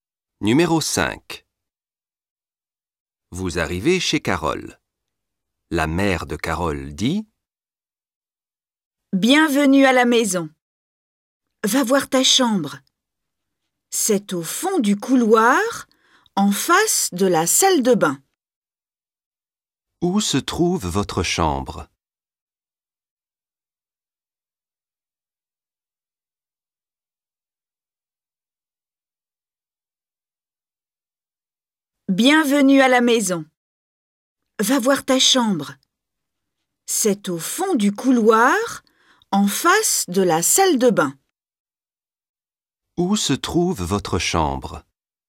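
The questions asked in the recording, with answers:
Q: Où se trouve votre chambre?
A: Au fond du couloir, en face de la salle de bain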